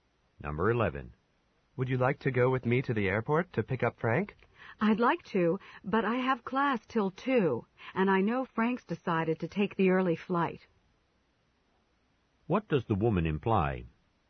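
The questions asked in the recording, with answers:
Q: What does the woman imply?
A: She can't go because Frank arrives before her class ends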